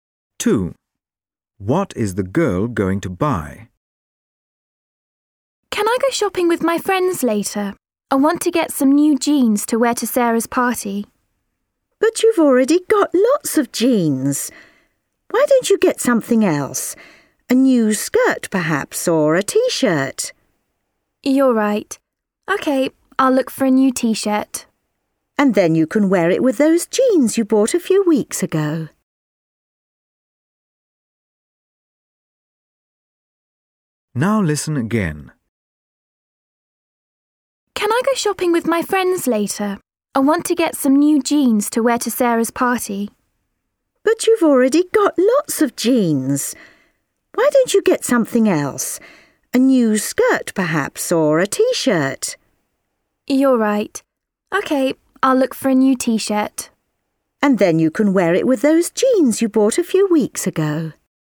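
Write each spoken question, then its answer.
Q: What is the girl going to buy?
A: A t-shirt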